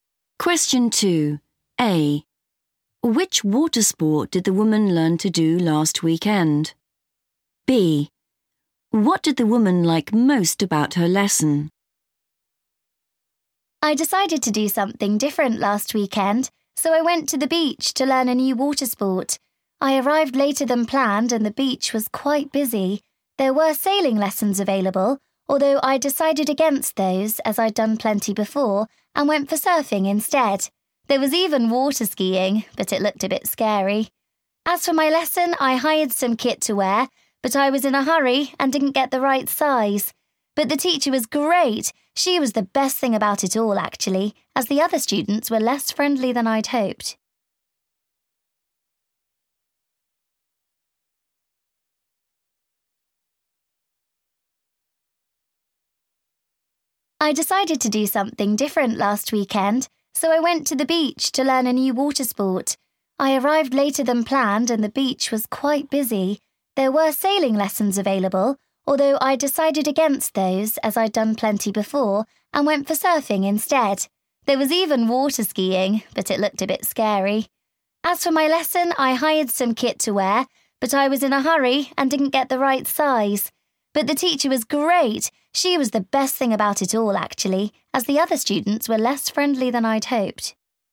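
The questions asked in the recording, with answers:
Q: Which water sport did the woman learn to do last weekend?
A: surfing

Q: What did the woman like most about her lesson?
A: the teacher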